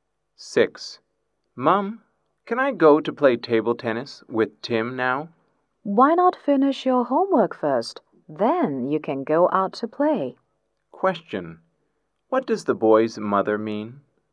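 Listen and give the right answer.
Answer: He should finish his homework before going out to play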